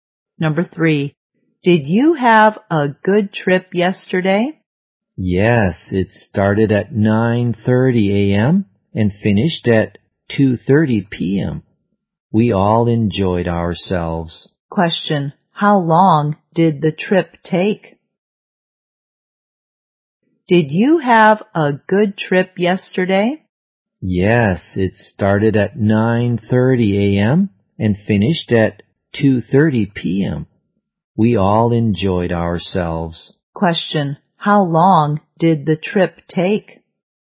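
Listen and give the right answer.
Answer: Five hours.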